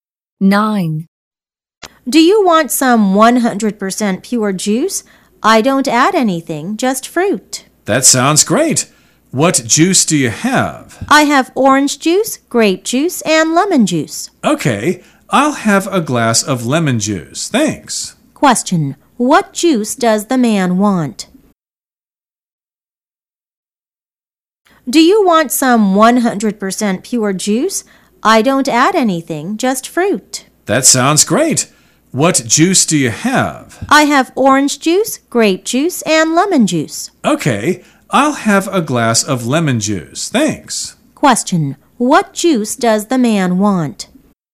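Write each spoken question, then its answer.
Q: Question. What juice does the man want?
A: Lemon juice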